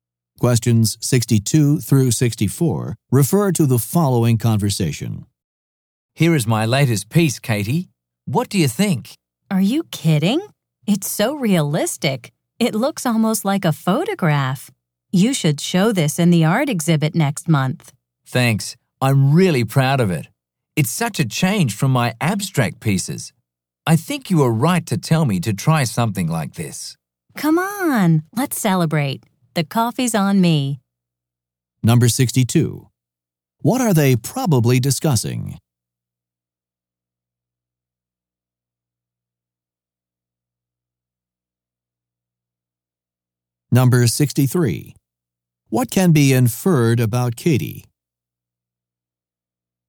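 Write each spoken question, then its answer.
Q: What are they probably discussing?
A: A realistic painting (artwork)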